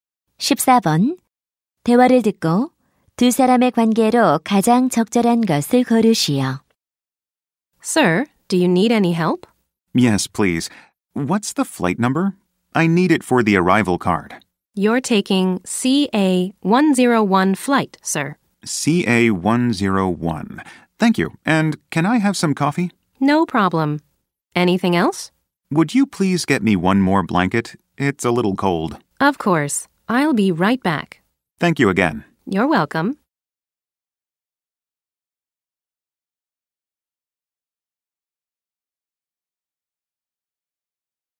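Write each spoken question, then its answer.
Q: 대화를 듣고 두 사람의 관계로 가장 적절한 것을 고르시오.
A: 승무원과 승객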